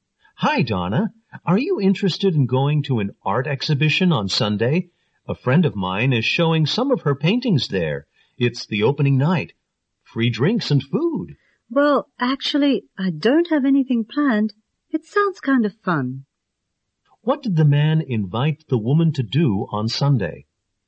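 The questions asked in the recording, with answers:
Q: What did the man invite the woman to do on Sunday?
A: Go to an art exhibition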